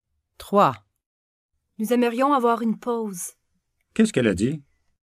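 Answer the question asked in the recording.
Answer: Elle a dit qu'ils aimeraient avoir une pause.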